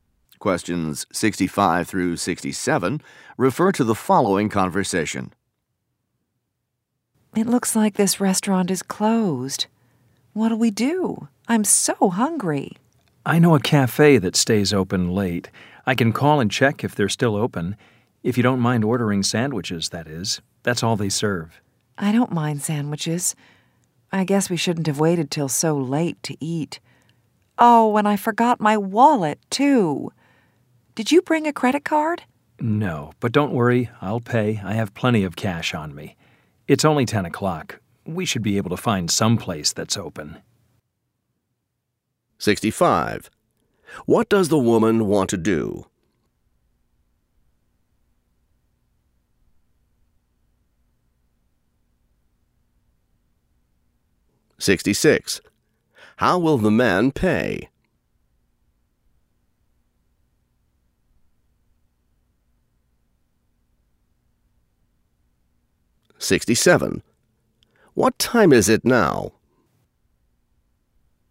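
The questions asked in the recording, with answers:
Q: What time is it now?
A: 10 o'clock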